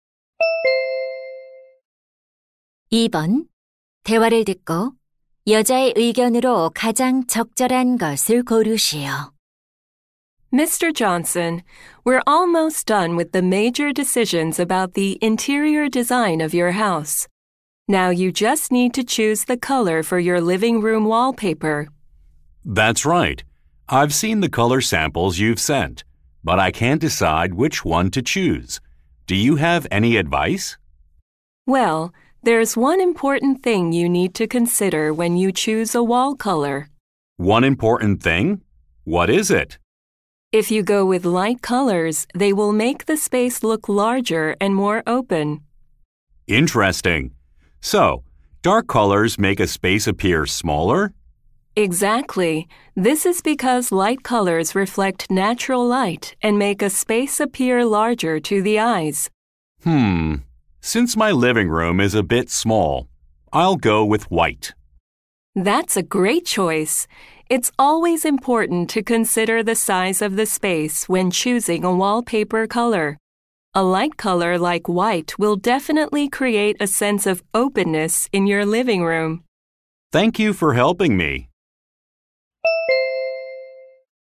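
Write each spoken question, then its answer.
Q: 대화를 듣고 여자의 의견으로 가장 적절한 것을 고르시오.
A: 벽지 색을 고를 때 공간의 크기를 고려해야 한다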